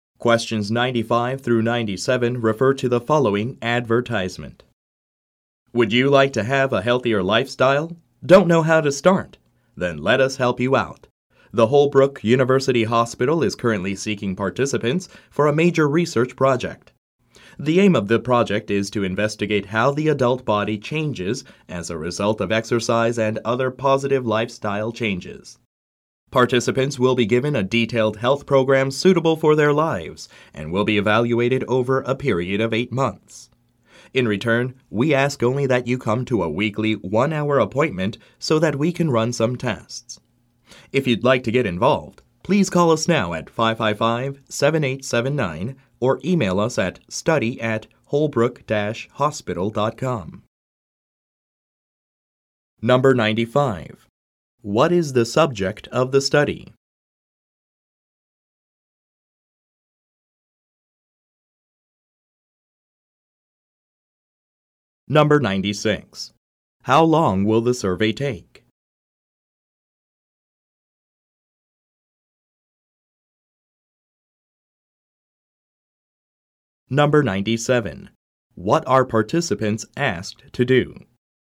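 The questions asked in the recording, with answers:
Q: What is the subject of the study?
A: How the adult body changes as a result of exercise and positive lifestyle changes

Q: How long will the survey take?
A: 8 months

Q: What are participants asked to do?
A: Come to a weekly 1-hour appointment for tests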